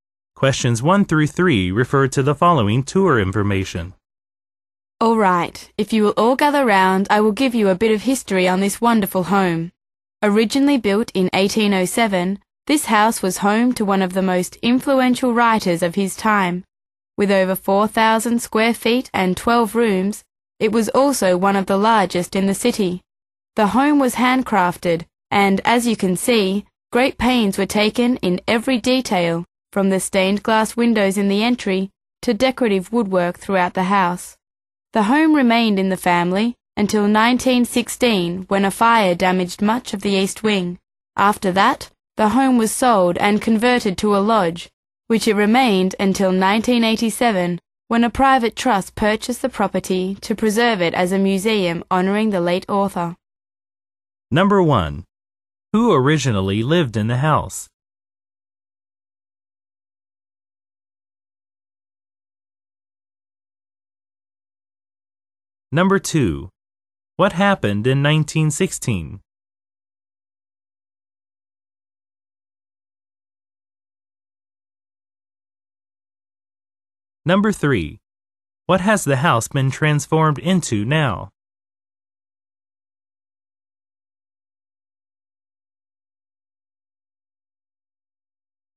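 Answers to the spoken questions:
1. An influential writer
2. A fire damaged much of the east wing
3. A museum honoring the late author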